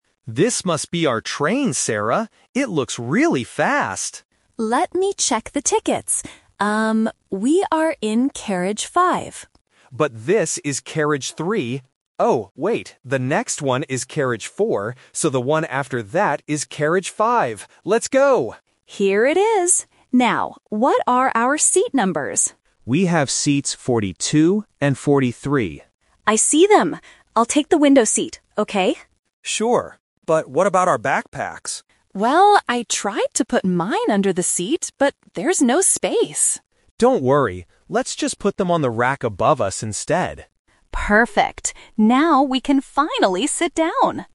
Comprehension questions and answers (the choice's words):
Listen to the conversation between Mark and Sarah on a train and choose the best answer (A, B, or C).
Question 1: Which carriage is their seat in?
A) Carriage 3.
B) Carriage 4.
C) Carriage 5.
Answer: Carriage 5.

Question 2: What are their seat numbers?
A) 42 and 43.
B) 52 and 53.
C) 14 and 15.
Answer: 42 and 43.

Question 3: Where will they put their backpacks?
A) Under the seats.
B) On the rack above.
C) In a different carriage.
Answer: On the rack above.

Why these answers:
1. Mark first notices carriage 3, then mentions carriage 4, but Sarah's ticket clearly states they are in "carriage five." Options (A) and (B) are distractors based on the numbers they see while walking.
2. Mark explicitly states, "We have seats 42 and 43." Option (B) is a trap using the number "5" from the carriage number. Option (C) is not mentioned.
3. This is "The Twist." Sarah tried to put the bag "under the seat" (Option A - The Trap), but it failed because there was no space. Mark then suggests the "rack above" (The Key).